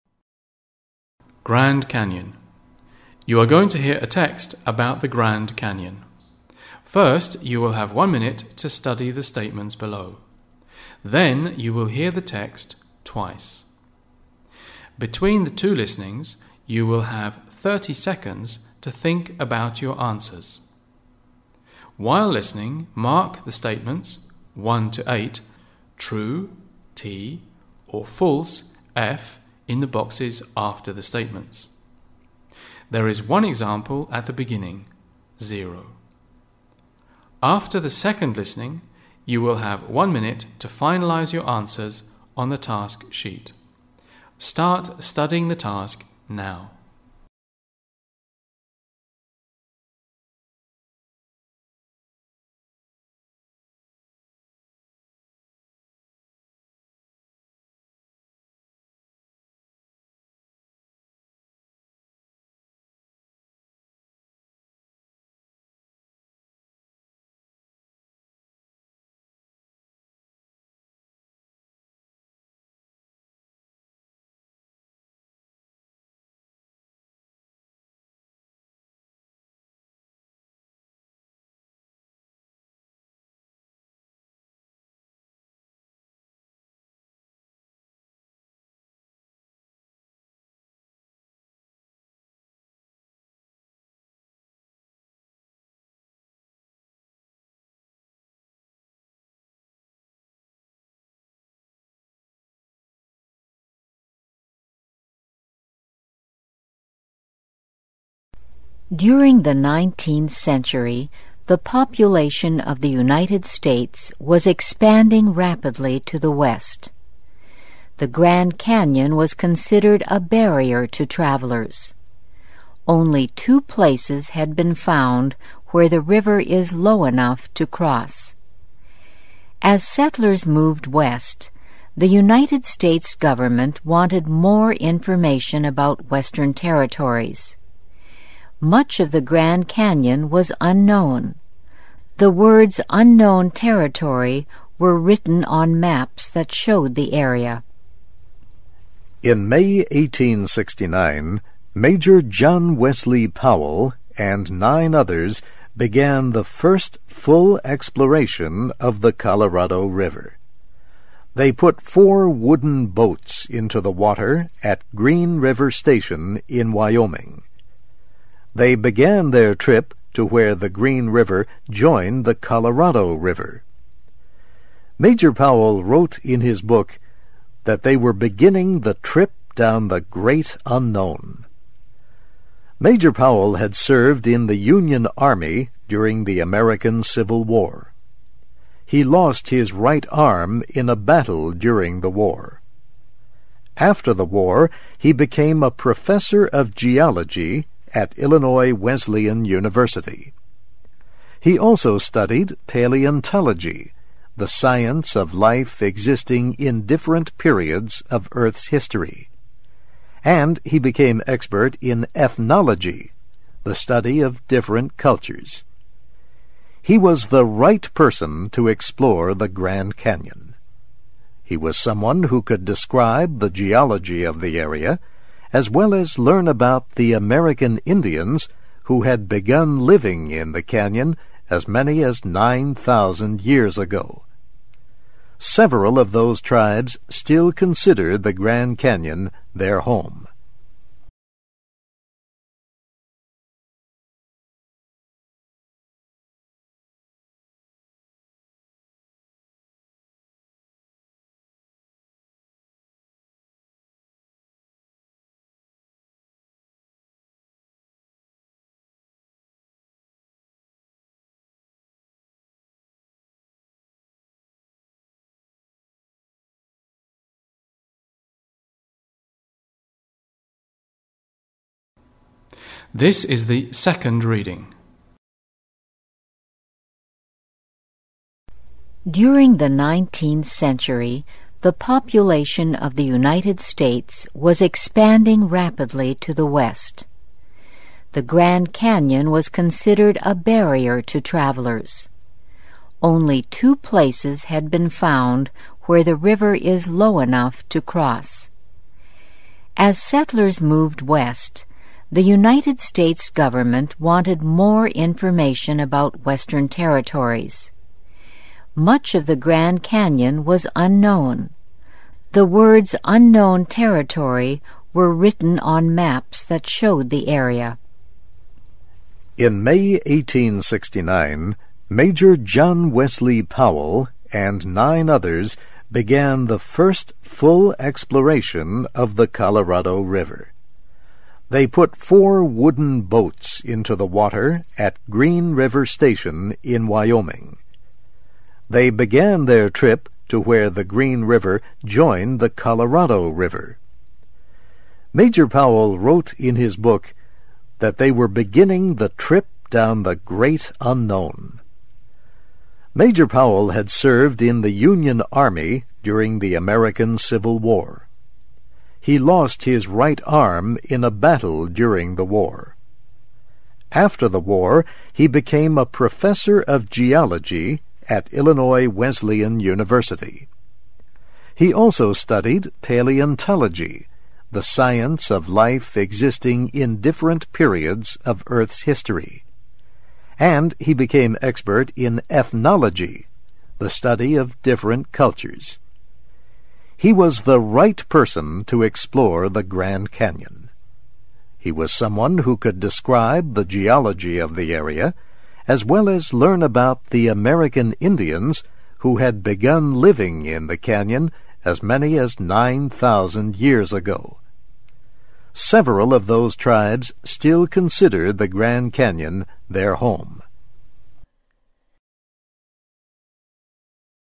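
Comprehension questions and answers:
You are going to hear a text about the Grand Canyon.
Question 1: People could cross the river only at one place.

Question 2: The American government became interested in the Western region.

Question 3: Major Powell started the full exploration of the Colorado River with a team of 5.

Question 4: They wanted to reach the place where the two rivers meet.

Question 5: Major Powell lost his right arm during the expedition.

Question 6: Major Powell became very good at ethnology.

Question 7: Major Powell taught the American Indians in the area.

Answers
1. False
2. True
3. False
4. True
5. False
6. True
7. False

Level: B1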